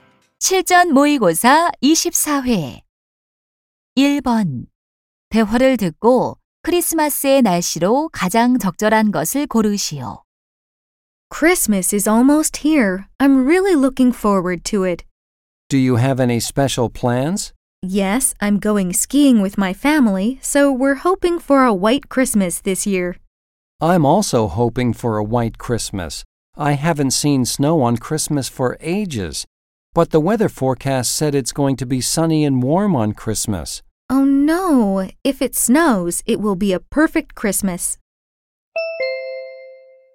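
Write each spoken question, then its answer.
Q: 대화를 듣고 크리스마스의 날씨로 가장 적절한 것을 고르시오.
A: 맑고 따뜻함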